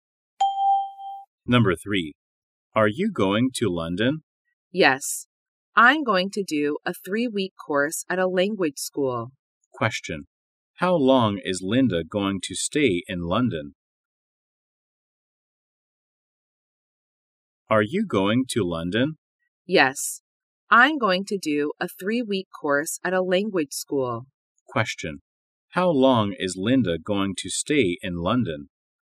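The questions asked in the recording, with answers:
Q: How long is Linda going to stay in London?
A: 3 weeks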